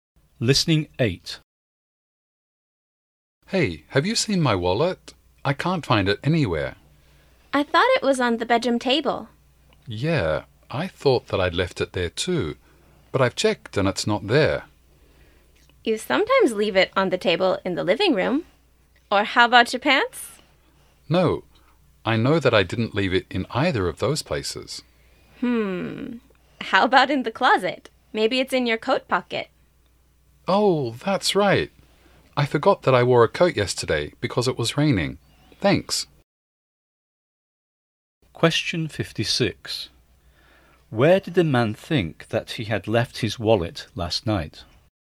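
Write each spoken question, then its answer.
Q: Where did the man think that he had left his wallet last night?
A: On the bedroom table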